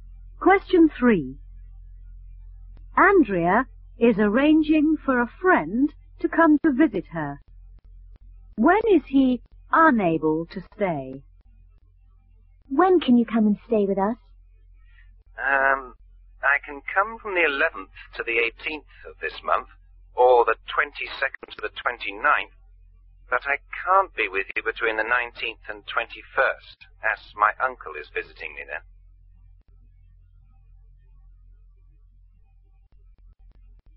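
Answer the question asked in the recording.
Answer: Between the 19th and 21st of this month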